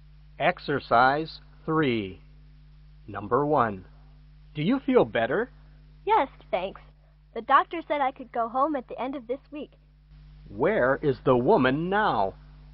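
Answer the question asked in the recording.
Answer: In the hospital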